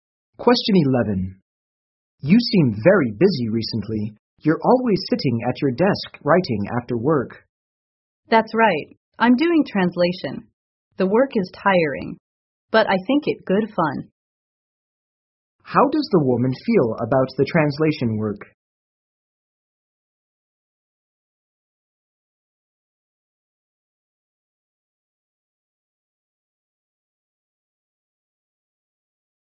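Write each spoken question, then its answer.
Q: How does the woman feel about the translation work?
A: Tiring but fun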